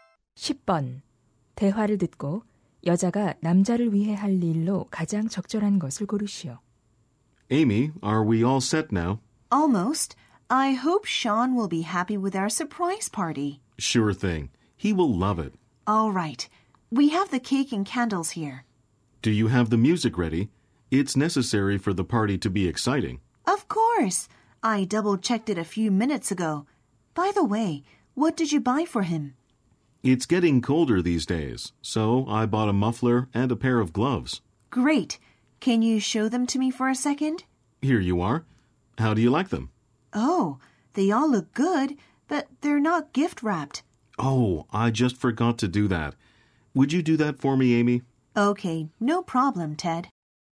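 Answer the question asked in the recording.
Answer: 선물 포장하기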